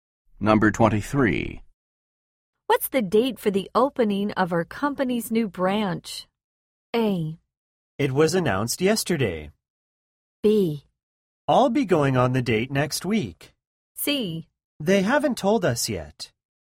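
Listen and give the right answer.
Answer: C: They haven't told us yet.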